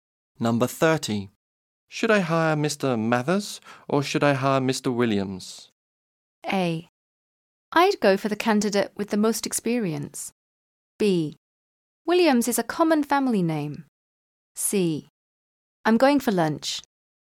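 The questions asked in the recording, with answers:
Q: Should I hire Mr.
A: A: I'd go for the candidate with the most experience.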